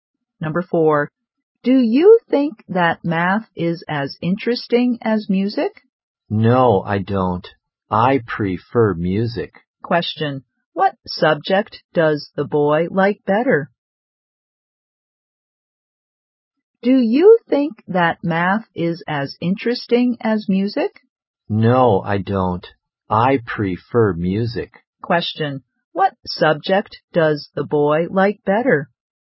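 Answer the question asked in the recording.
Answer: Music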